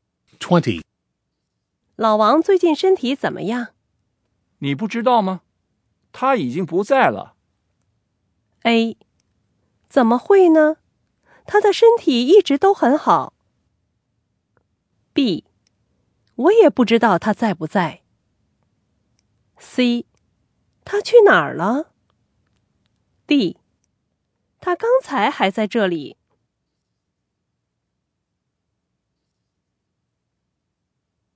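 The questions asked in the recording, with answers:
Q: 你不知道吗?他已经不在了。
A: A: 怎么会呢?他的身体一直都很好。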